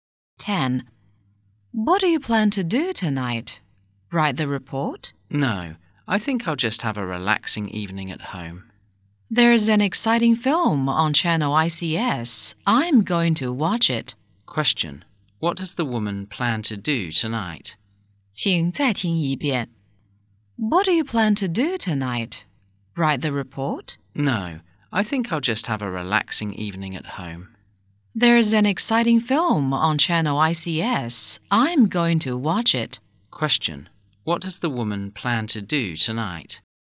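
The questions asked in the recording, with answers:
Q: What does the woman plan to do tonight?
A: Watch a film at home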